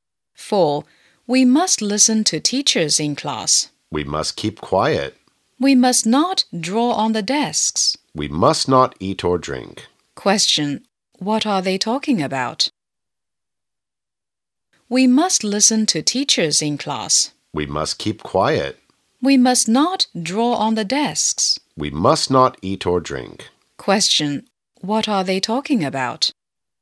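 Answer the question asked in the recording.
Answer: Classroom rules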